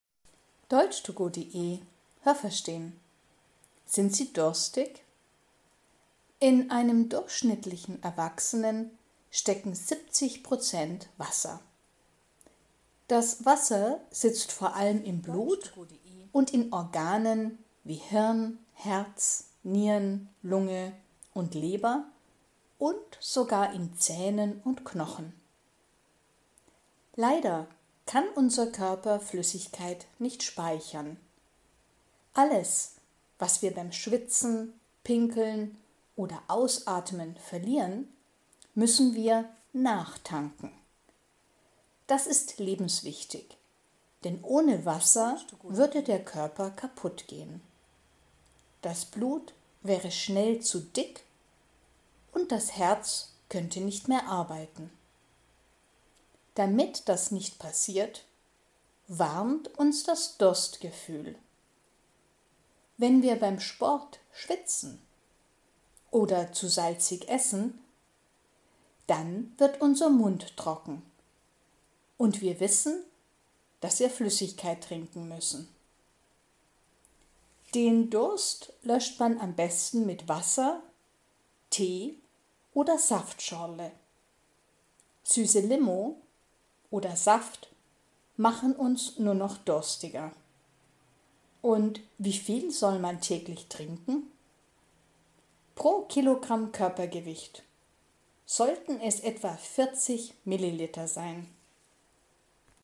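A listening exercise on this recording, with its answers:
Was haben Sie gehört? Es gibt nur eine korrekte Antwort.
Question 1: In einem Erwachsenen stecken _____ Wasser.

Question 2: Das Wasser ist ...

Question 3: Der Mensch kann Flüssigkeit ...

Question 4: Wenn im Körper kein Wasser ist, wird ...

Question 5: Wenn man _____ isst, wird der Mund trocken.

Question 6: Man kann den Durst gut mit _____ löschen.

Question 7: Ein Mensch, der 100 Kilogramm wiegt, sollte täglich _____ trinken.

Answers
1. 70%
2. vor allem im Blut und in Organen
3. nicht speichern
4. das Blut zu dick
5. zu salzig
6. Wasser, Tee oder Saftschorle
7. 4 Liter

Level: A (einfach)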